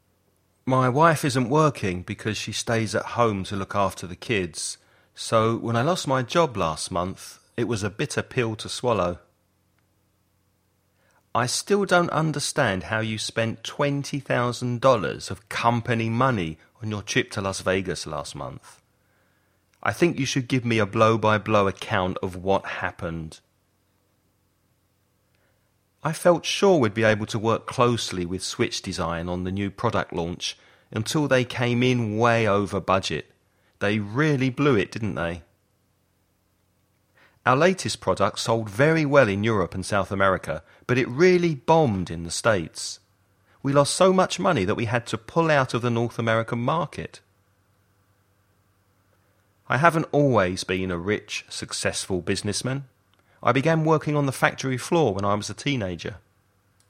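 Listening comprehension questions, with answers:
Choose the best words for each gap.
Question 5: I haven't always been a rich, successful businessman. I began working on the when I was a teenager.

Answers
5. factory floor

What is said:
My wife isn't working because she stays at home to look after the kids, so when I lost my job last month it was a bitter to swallow.
I still don't understand how you spent $20,000 of company money on your trip to Las Vegas last month. I think you should give me a account of what happened.
I felt sure we'd be able to work closely with Switch Design on the new product launch until they came in way over budget. They really , didn't they?
Our latest product sold very well in Europe and South America, but it really in the States. We lost so much money that we had to pull it out of the North American market.
I haven't always been a rich, successful businessman. 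I began working on the when I was a teenager.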